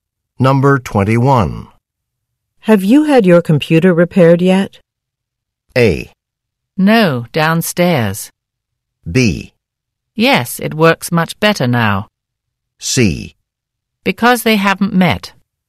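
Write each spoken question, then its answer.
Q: Have you had your computer repaired yet?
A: B: Yes, it works much better now.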